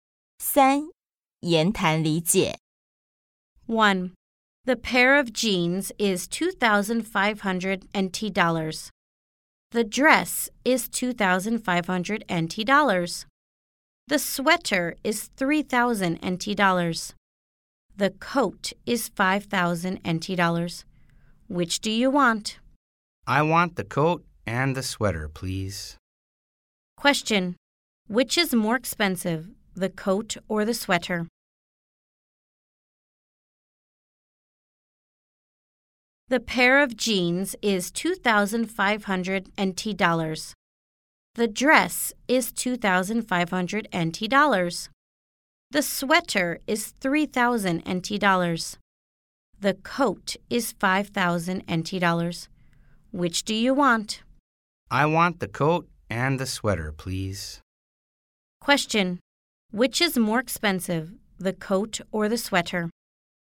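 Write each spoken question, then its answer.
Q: Question. Which is more expensive, the coat or the sweater?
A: The coat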